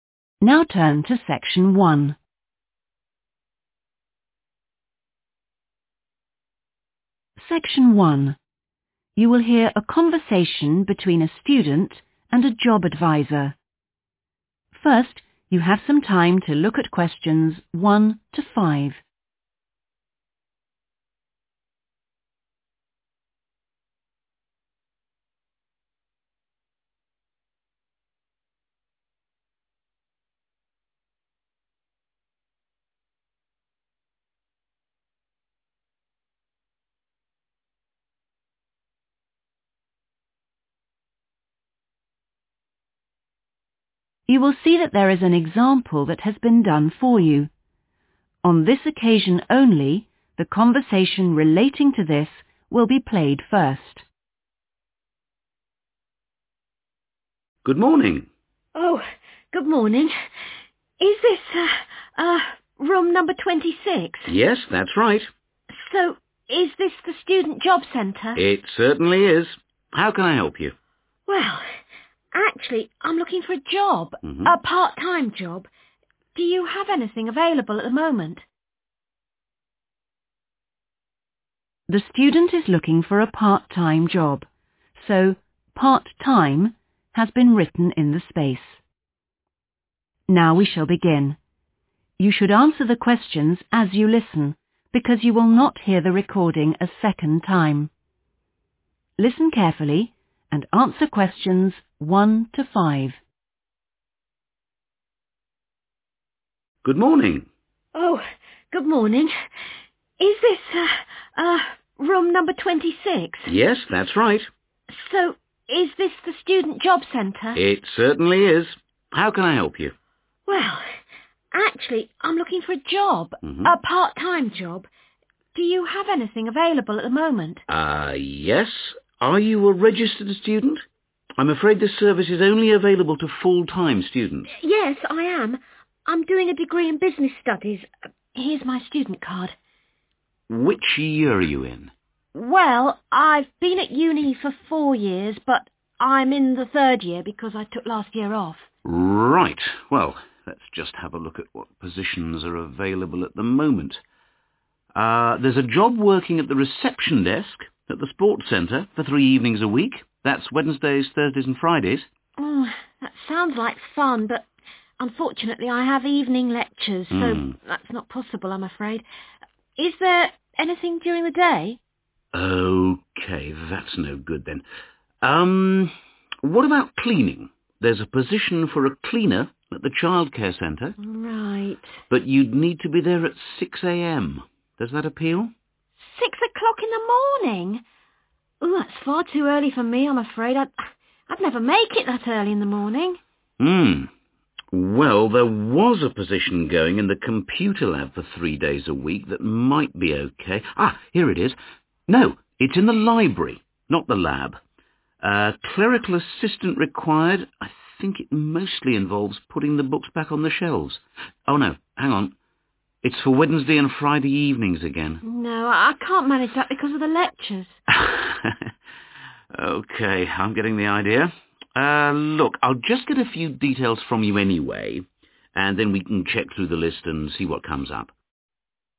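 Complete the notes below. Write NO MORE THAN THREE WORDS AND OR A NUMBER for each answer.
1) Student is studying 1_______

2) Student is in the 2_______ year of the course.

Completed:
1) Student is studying business studies
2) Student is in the third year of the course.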